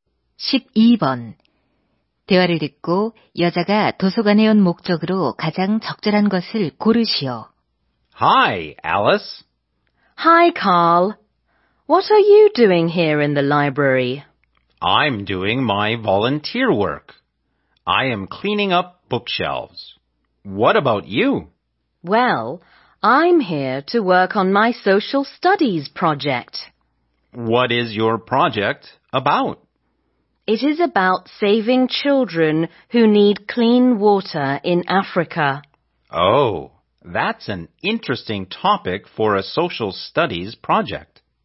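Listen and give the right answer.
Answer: 사회 과제를 하기 위해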